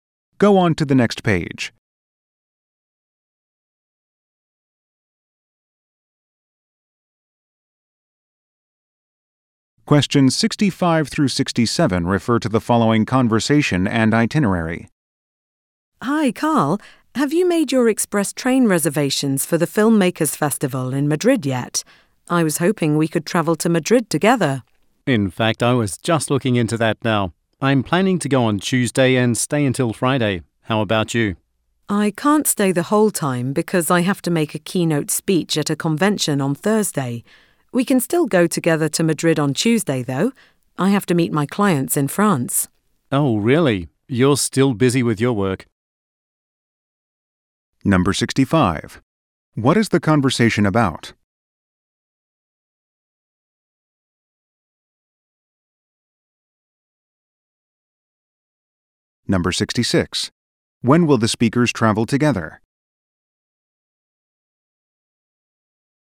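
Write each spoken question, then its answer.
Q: What is the conversation about?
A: Travel plans for a film festival in Madrid

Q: When will the speakers travel together?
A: On Tuesday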